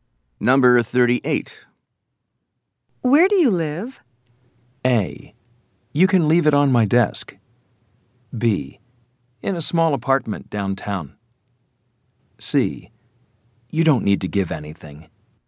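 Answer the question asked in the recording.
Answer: B: In a small apartment downtown.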